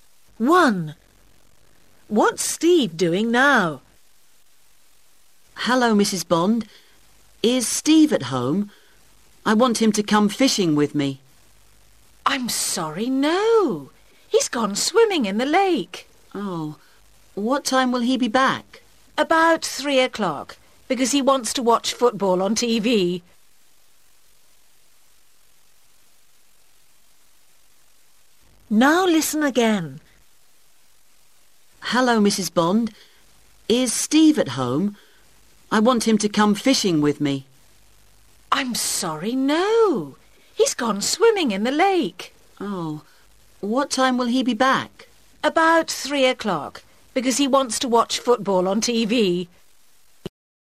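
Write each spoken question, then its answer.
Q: What's Steve doing now?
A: He's swimming in the lake.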